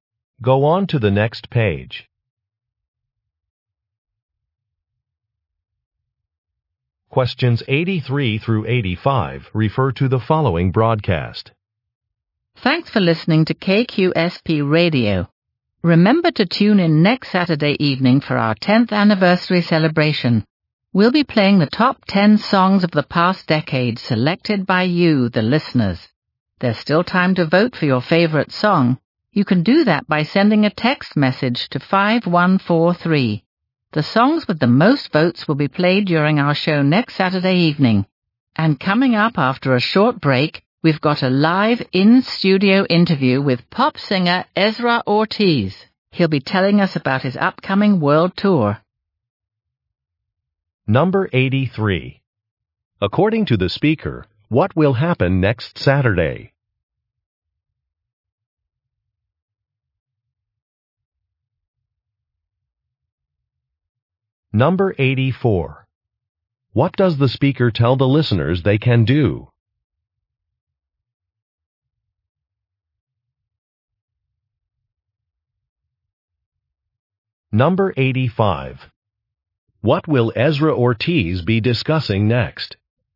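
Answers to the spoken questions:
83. The station's 10th anniversary celebration with the top 10 songs
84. Vote for their favorite song by text message
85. His upcoming world tour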